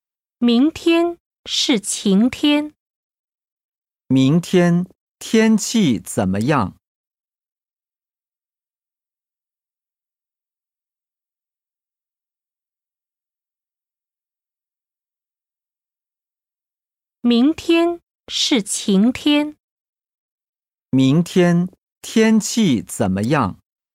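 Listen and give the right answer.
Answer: 晴天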